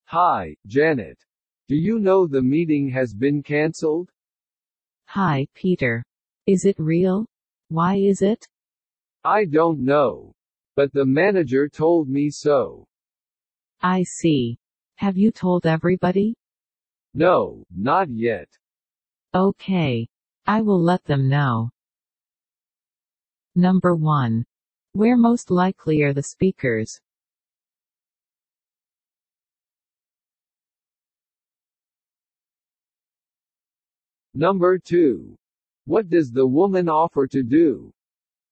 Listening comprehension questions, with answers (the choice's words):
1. Where most likely are the speakers?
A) At an office.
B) At a zoo.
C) At a parking lot.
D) At a station.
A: At an office.

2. What does the woman offer to do ?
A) Meet the manager.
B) Go to the meeting room.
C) Cancell an order.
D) Tell coworkers about cancellation.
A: Tell coworkers about cancellation.

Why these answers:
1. 場所は会社であることが、会話の前半で明らかになっていますね。
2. (A)manager(B)meeting(C)cancell と、会話の中で出てくる単語が選択肢にも使われていますが、こういった言葉に惑わされないようにしてください。 let them know(彼らに知らせる=tell them)という表現は、"Please let me know."や"I will let you know"といった形でよく出てきますので覚えておきましょう。